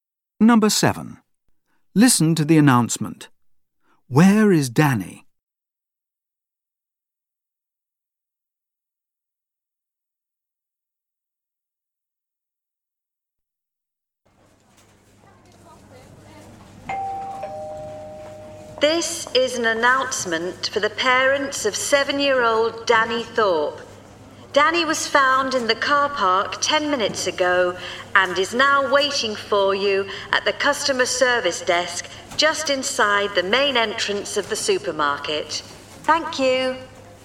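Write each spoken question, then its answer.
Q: Where is Danny?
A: At the customer service desk inside the supermarket's main entrance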